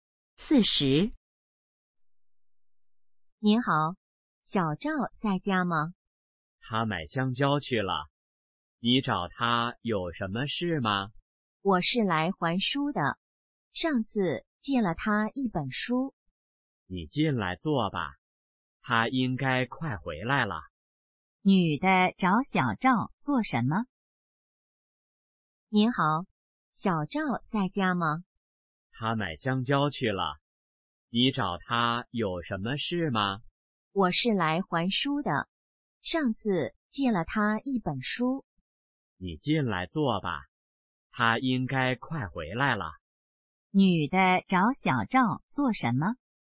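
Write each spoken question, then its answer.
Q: 女的找小赵做什么?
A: 还书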